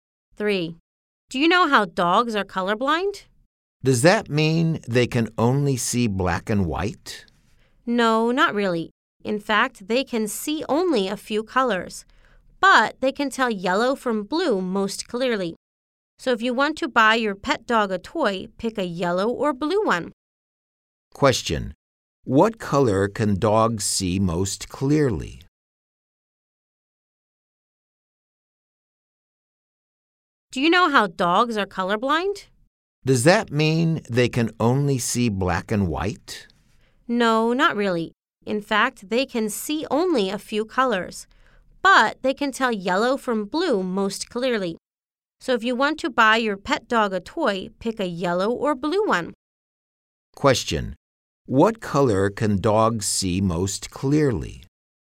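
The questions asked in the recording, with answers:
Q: What color can dogs see most clearly?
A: Yellow and blue.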